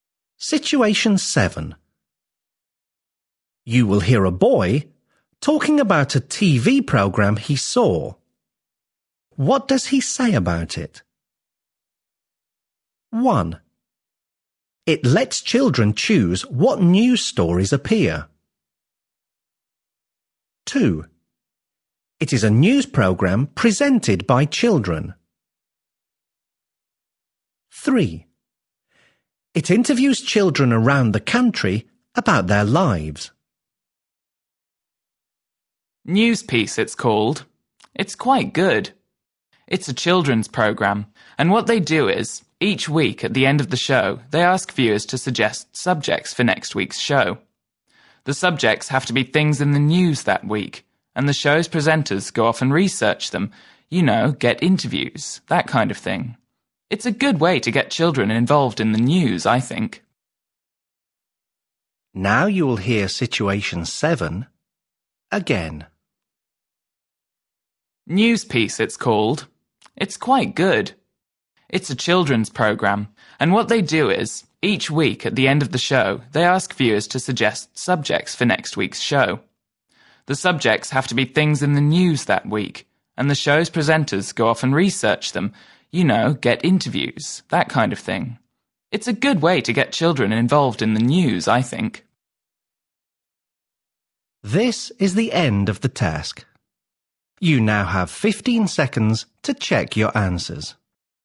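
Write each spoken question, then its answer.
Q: What does he say about it?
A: 1: It lets children choose what news stories appear.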